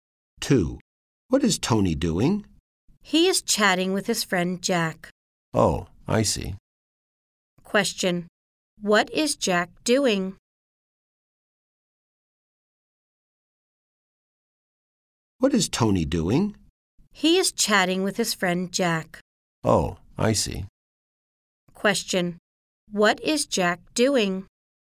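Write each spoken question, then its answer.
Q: what is Jack doing?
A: Chatting with Tony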